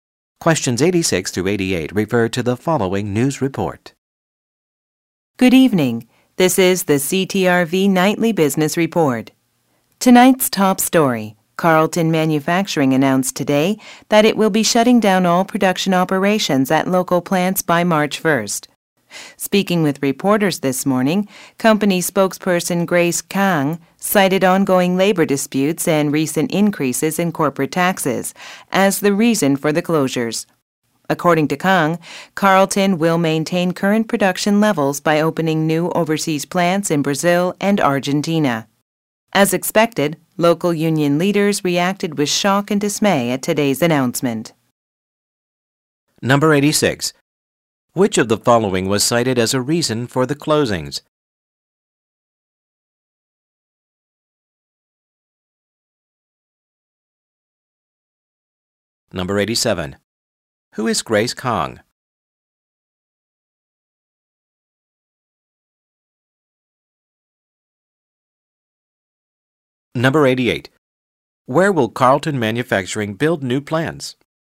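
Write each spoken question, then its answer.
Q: Who is Grace Kang?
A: A company spokesperson

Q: Where will Carlton Manufacturing build new plants?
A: In Brazil and Argentina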